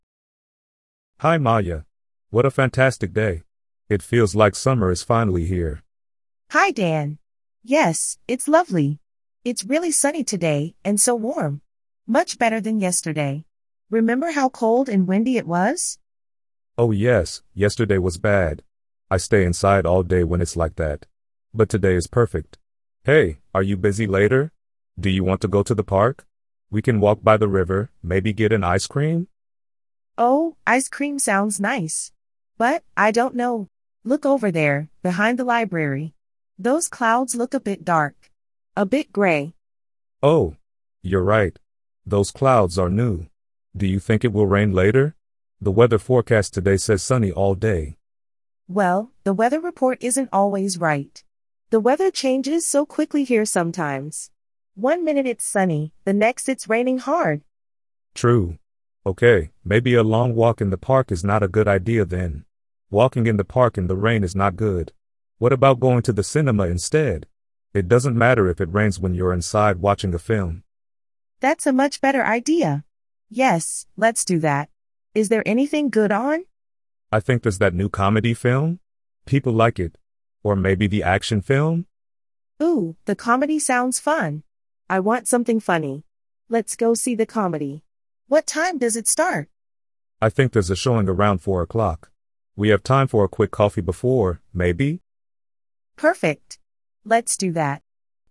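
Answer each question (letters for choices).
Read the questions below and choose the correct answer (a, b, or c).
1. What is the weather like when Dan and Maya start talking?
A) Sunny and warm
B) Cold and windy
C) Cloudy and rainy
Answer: A

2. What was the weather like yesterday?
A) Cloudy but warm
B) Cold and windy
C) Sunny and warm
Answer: B

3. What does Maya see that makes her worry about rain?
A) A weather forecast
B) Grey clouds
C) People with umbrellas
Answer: B

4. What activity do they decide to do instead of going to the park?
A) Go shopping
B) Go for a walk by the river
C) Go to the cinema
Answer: C

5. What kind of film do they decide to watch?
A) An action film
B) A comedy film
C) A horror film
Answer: B

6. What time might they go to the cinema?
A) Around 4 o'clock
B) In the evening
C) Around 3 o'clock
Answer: A

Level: Beginner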